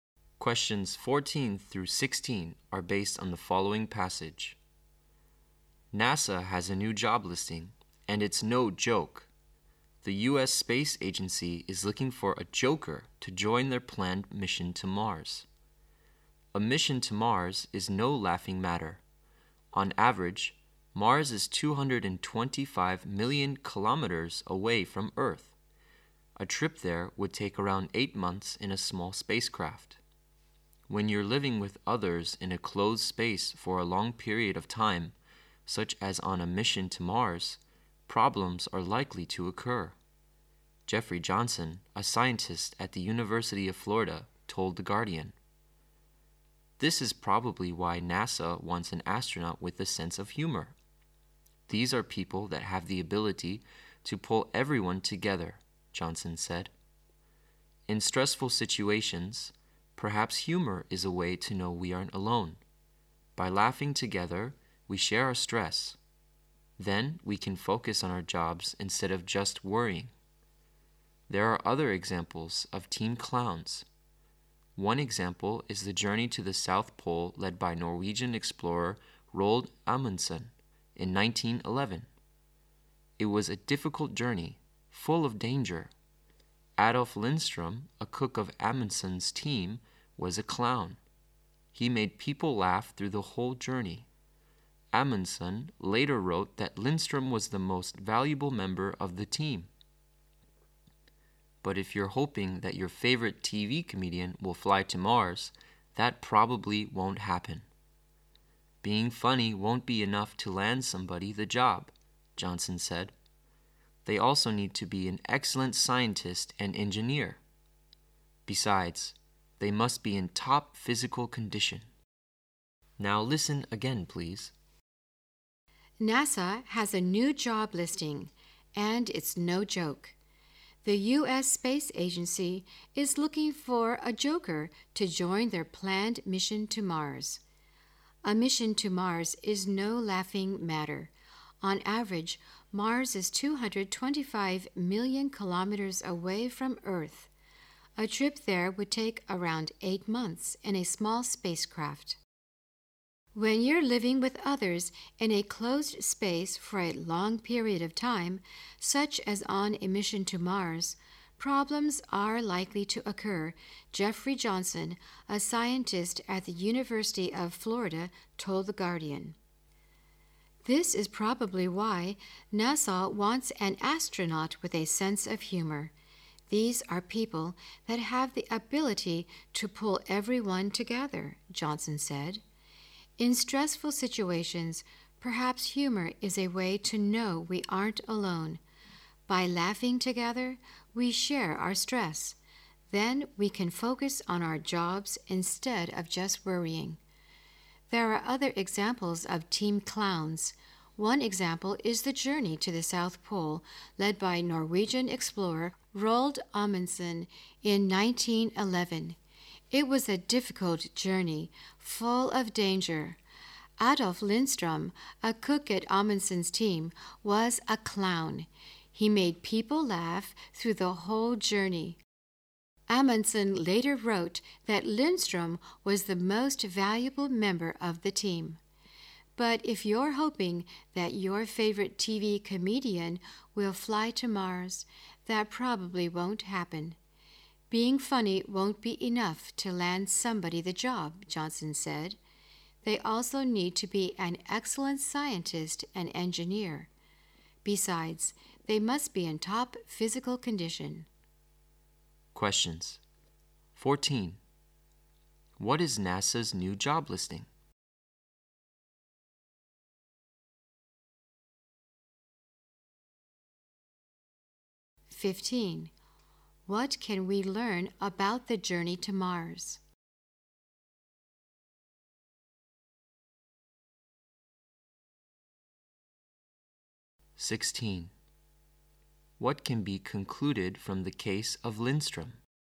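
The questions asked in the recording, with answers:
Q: What is NASA's new job listing?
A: An astronaut with a sense of humor for the Mars mission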